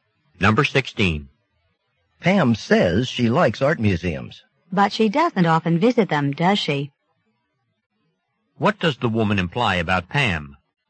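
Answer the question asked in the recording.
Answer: She rarely goes to art museums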